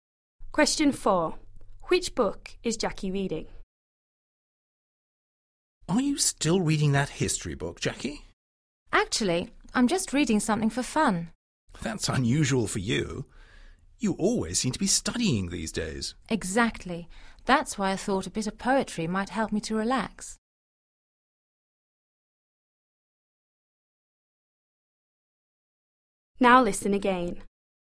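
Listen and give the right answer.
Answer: A poetry book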